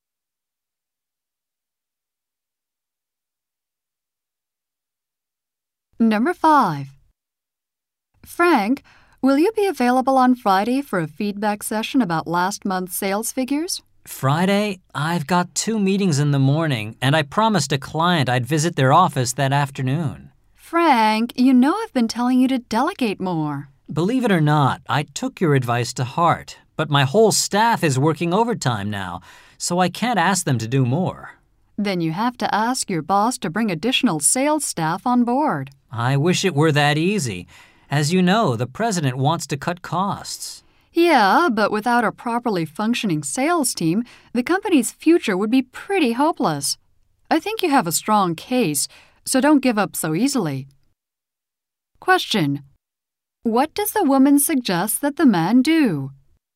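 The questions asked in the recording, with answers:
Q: What does the woman suggest that the man do?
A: Ask his boss to hire additional sales staff.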